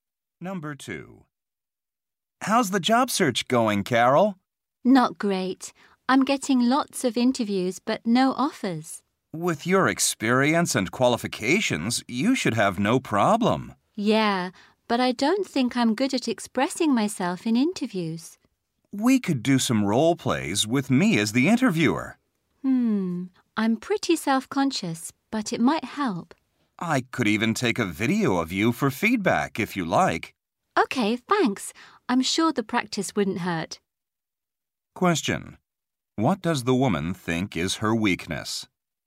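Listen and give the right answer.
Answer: Expressing herself in interviews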